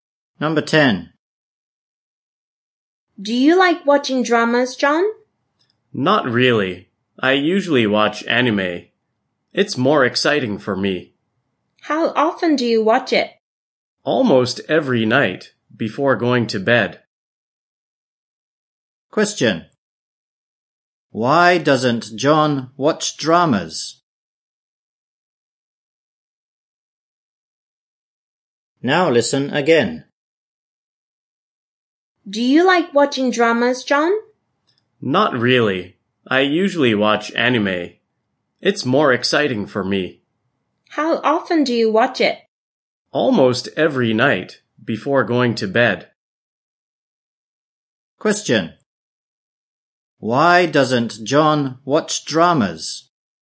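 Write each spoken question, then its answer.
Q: Why doesn't John watch dramas?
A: Anime is more exciting for him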